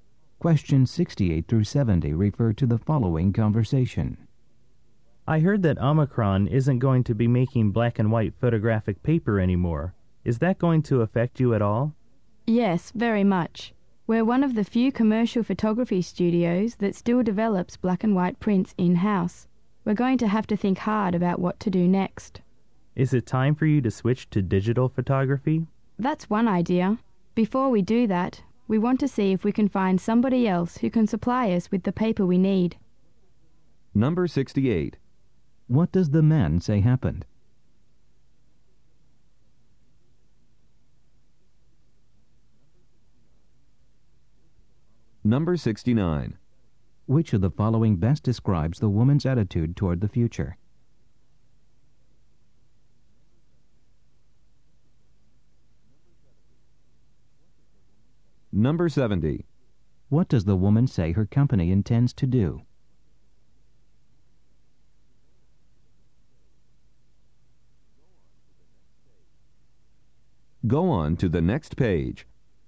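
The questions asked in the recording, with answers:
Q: What does the man say happened?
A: Omicron will stop making black and white photographic paper

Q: What does the woman say her company intends to do?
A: Look for another paper supplier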